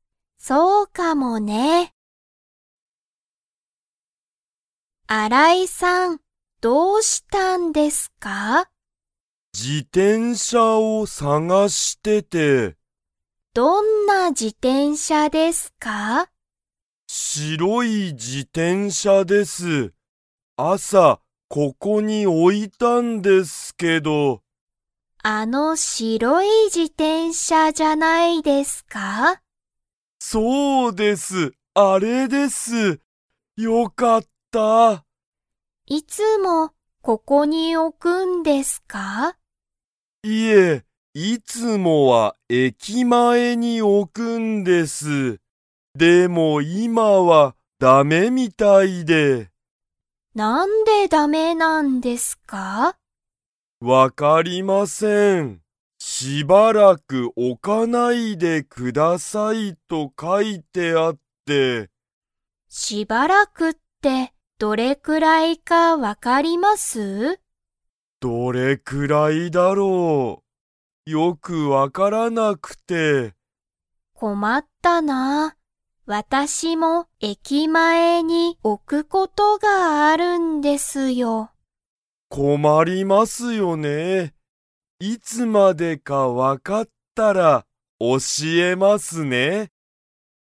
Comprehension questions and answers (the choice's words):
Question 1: 新井あらいさんは 自転車じてんしゃを探さがしている。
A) 新あたらしい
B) 高たかい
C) 困こまる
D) 白しろい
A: 白しろい

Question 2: 武田たけださんは、自転車じてんしゃを駅前えきまえに置おくことがありますか?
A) はい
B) いいえ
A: はい

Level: Level 3